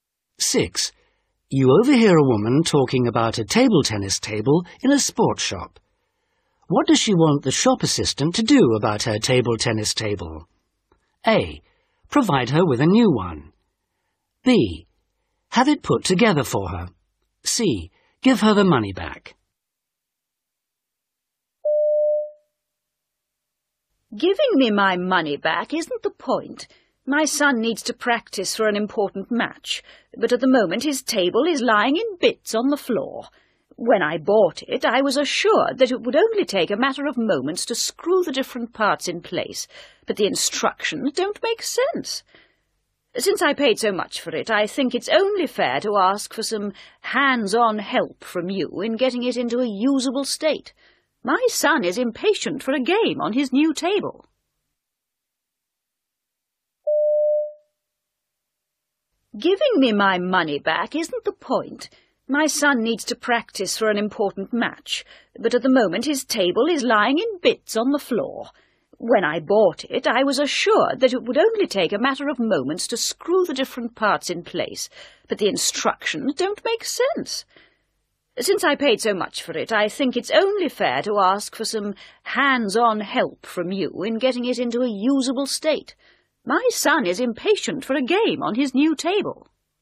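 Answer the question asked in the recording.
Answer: B: Have it put together for her.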